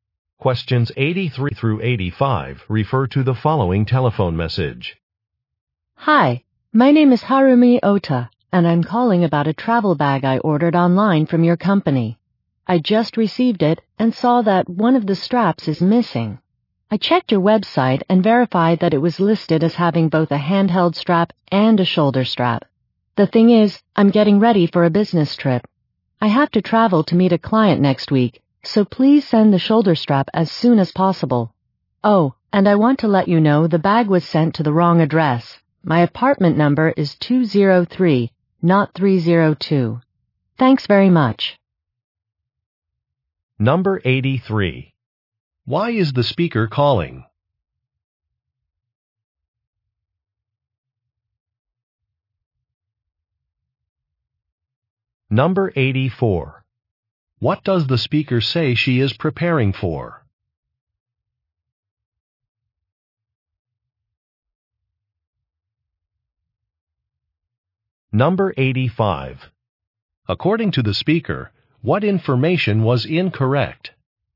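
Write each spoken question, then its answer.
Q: Why is the speaker calling?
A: A strap is missing from the bag she ordered

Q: What does the speaker say she is preparing for?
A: A business trip

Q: According to the speaker, what information was incorrect?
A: The apartment number in the address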